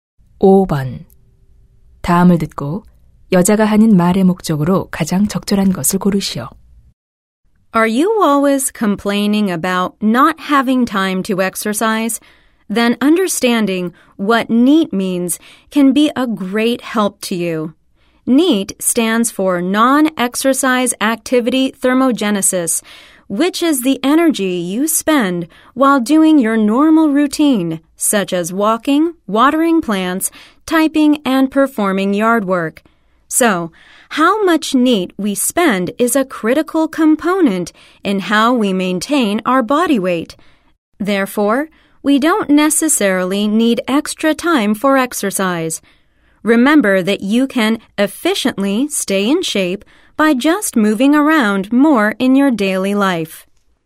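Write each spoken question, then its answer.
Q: 다음을 듣고 여자가 하는 말의 목적으로 가장 적절한 것을 고르시오.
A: 일상생활에서 많이 움직이는 것으로 건강을 유지할 수 있음을 알리려고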